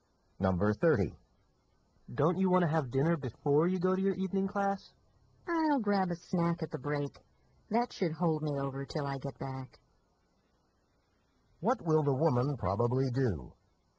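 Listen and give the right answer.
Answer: Have a snack during the class break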